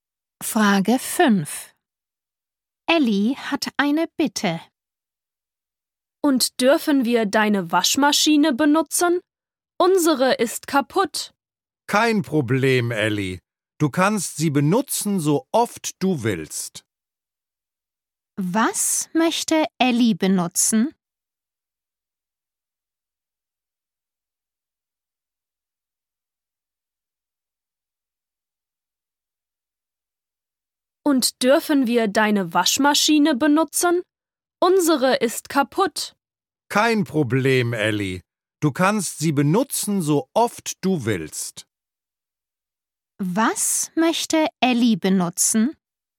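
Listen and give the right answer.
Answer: die Waschmaschine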